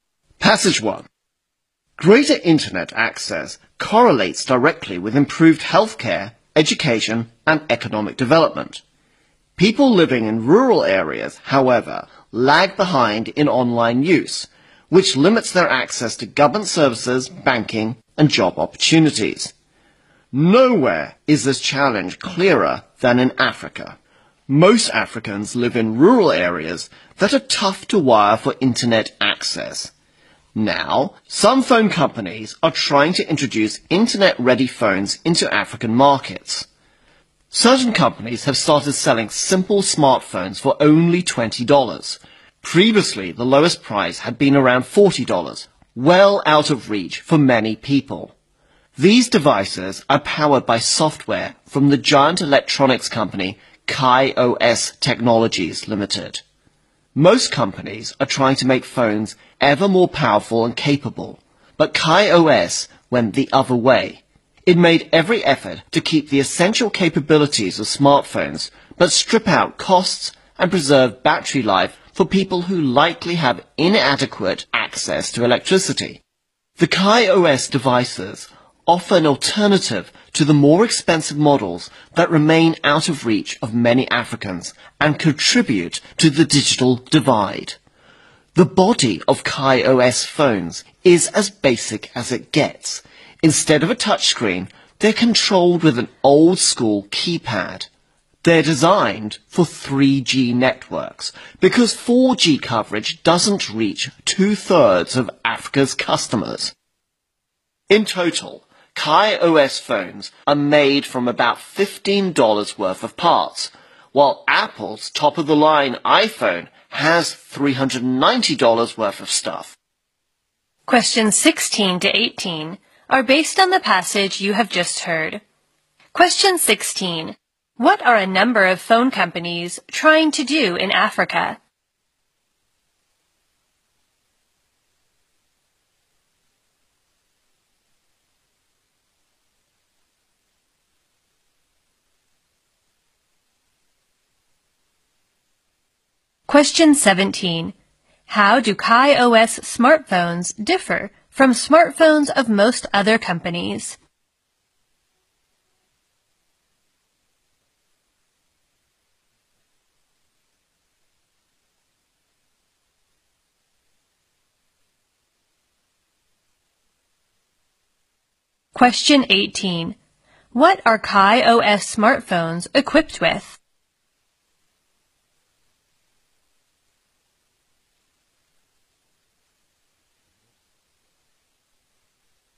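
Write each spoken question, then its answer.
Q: What are a number of phone companies trying to do in Africa?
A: Introduce cheap internet-ready phones into African markets.

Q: How do KaiOS smartphones differ from smartphones of most other companies?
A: They keep essential capabilities but strip out costs and save battery instead of being more powerful.

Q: What are KaiOS smartphones equipped with?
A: An old-school keypad.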